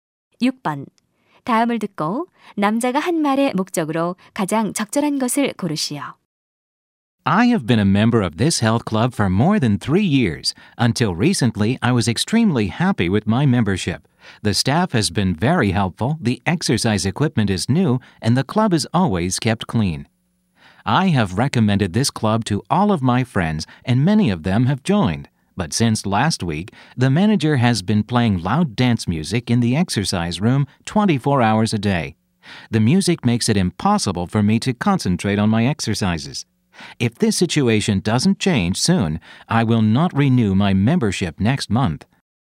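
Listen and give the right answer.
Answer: 시끄러운 음악에 대해 항의하려고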